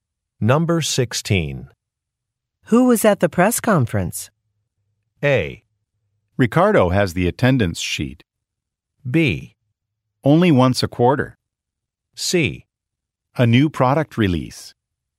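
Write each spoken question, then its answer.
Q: Who was at the press conference?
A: A: Ricardo has the attendance sheet.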